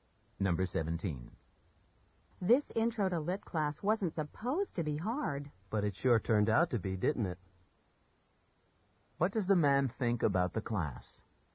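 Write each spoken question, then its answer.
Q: What does the man think about the class?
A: It's harder than expected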